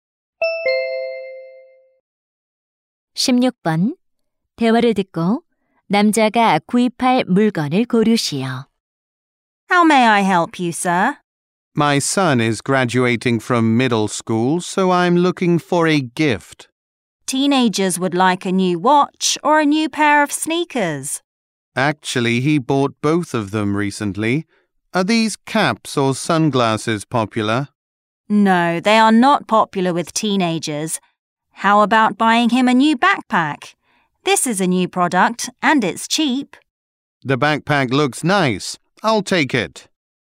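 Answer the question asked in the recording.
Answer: 배낭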